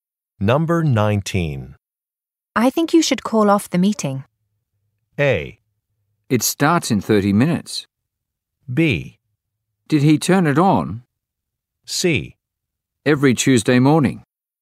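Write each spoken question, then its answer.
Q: I think you should call off the meeting.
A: A: It starts in 30 minutes.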